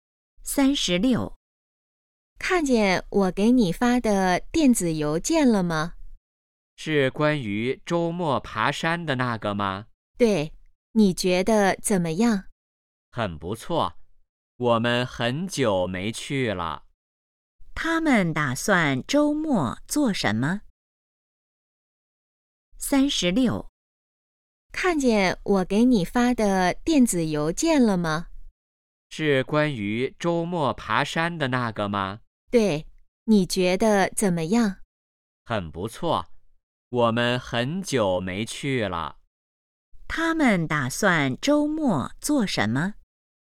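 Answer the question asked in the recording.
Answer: 爬山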